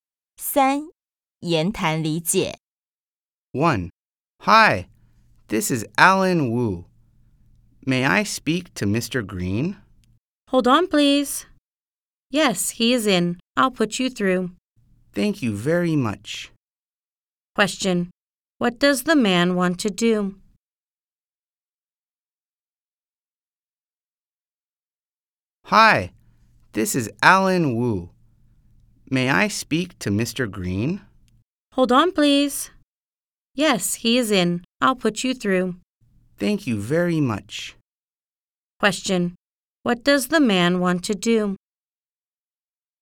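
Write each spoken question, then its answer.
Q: What does the man want to do?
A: Speak to Mr. Green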